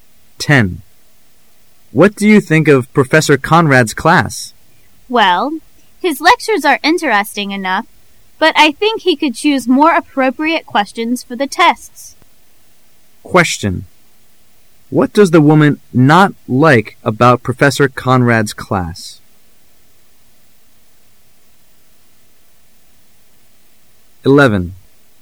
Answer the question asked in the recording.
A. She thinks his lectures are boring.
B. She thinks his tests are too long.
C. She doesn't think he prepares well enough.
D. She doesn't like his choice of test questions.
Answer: D. She doesn't like his choice of test questions.

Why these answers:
M: What do you think of Professor Conrad's class? W: Well, his lectures are interesting enough, but I think he could choose more appropriate questions for the tests. Q: What does the woman NOT like about Professor Conrad's class? [试题分析]本题考查对文中细节的辨识。 [关键词语]choose more appropriate questions [详细解答]the woman认为professor Conrad的讲座非常有趣,但她认为那位教授出的考题应该更合适一些。所以the woman所不喜欢的是professor Conrad所选择的那类考题,故应选D。

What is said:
[解析] M: What do you think of Professor Conrad's class? W: Well, his lectures are interesting enough, but I think he could choose more appropriate questions for the tests. Q: What does the woman NOT like about Professor Conrad's class?